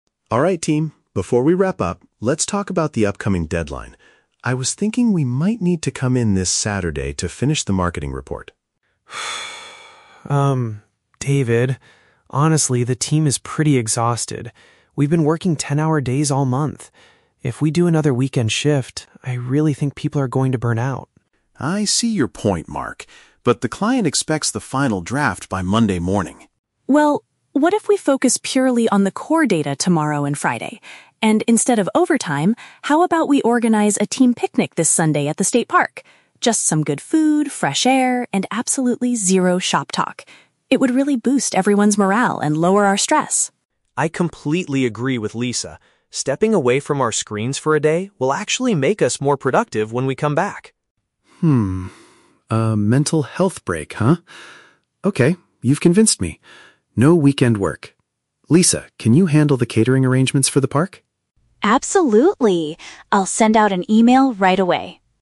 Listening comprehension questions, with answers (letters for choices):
Listen to a conversation among colleagues in a meeting. Choose the correct answer (A, B, or C) for each question.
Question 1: Why does Mark object to the manager's initial plan for Saturday?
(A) He believes the marketing report is already finished.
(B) He feels the staff members are at risk of severe fatigue.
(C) He has made plans to spend the weekend with his family.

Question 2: What is Lisa's alternative suggestion for the team?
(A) To spend Sunday enjoying nature and eating together.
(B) To work on the core data from home over the weekend.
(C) To go to a local restaurant to discuss the project.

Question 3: What does David decide to do at the end of the meeting?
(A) Contact the client to request a change to the Monday deadline.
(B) Ask the employees to bring their laptops to the park on Sunday.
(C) Cancel the extra work hours and assign a new task to Lisa.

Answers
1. B
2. A
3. C

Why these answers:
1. The Key: Mark says the team is "exhausted" and if they work on the weekend, people are going to "burn out". This is paraphrased as "at risk of severe fatigue". The Trap (A): The "marketing report" is mentioned, but it is not finished; David wants them to come in to finish it (Mentioned but wrong context). Plausible Trap (C): Spending time with family is a common reason to avoid weekend work, but Mark never mentions his family in the audio.

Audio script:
David: Alright team, before we wrap up, let's talk about the upcoming deadline. I was thinking we might need to come in this Saturday to finish the marketing report.
Mark: Um, David, honestly, the team is pretty exhausted. We've been working ten-hour days all month. If we do another weekend shift, I really think people are going to burn out.
David: I see your point, Mark. But the client expects the final draft by Monday morning.
Lisa: Well, what if we focus purely on the core data tomorrow and Friday? And instead of overtime, how about we organize a team picnic this Sunday at the state park? Just some good food, fresh air, and absolutely zero shop talk. It would really boost everyone's morale and lower our stress.
Mark: I completely agree with Lisa. Stepping away from our screens for a day will actually make us more productive when we come back.
A mental health break, huh? Okay, you've convinced me. No weekend work. Lisa, can you handle the catering arrangements for the park?